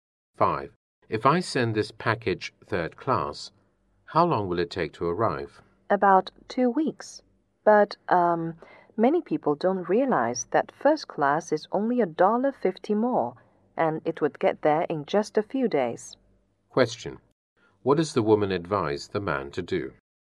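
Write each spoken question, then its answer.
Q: What does the woman advise the man to do?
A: Send the package first class.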